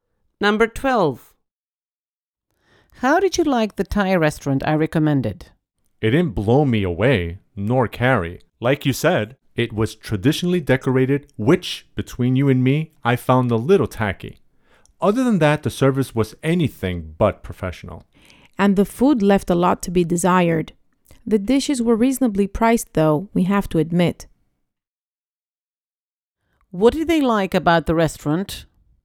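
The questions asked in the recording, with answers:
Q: What did they like about the restaurant?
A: The reasonable prices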